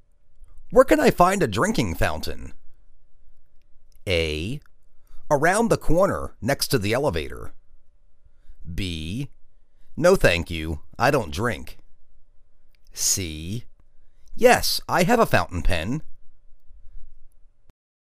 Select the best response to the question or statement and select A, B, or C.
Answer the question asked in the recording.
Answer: Around the corner, next to the elevator.